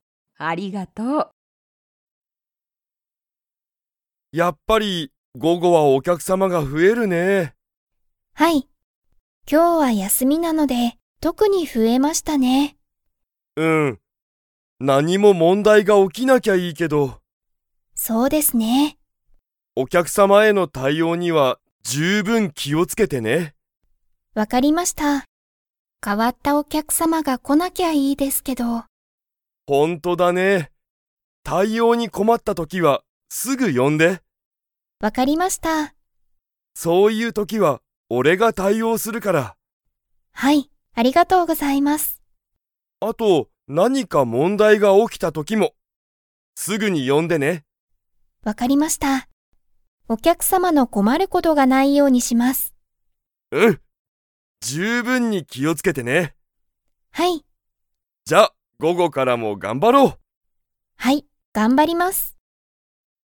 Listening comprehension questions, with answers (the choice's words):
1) 午後ごごはお客様きゃくさまが増ふえますか?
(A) はい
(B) いいえ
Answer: はい

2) 佐藤さとうさんは、何なにか が起おきた時ときにすぐ田中たなかさんを呼よぶ。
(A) お客様きゃくさま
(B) 午後ごご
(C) 問題もんだい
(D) 十分じゅうぶん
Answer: 問題もんだい

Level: Level 3